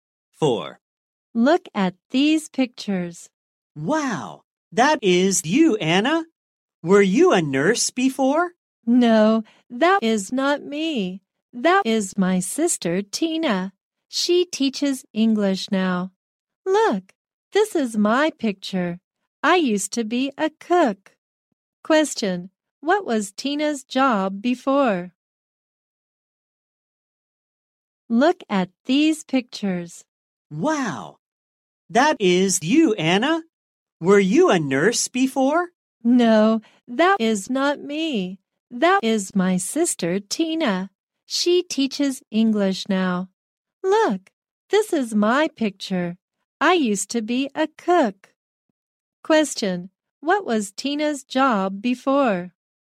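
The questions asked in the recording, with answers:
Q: Question, what was Tina's job before?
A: A nurse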